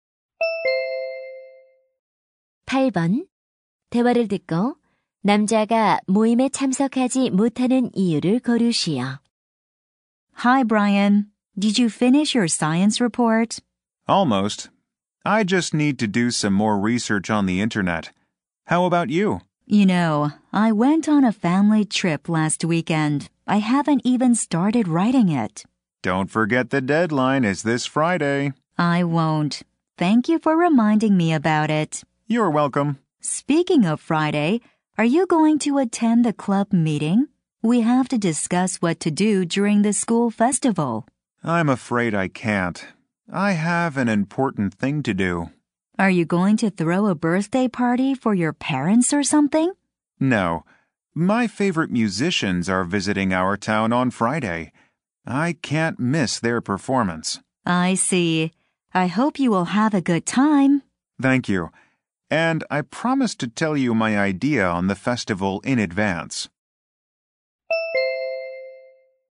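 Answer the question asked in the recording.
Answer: 좋아하는 음악가의 공연을 보러 가야 해서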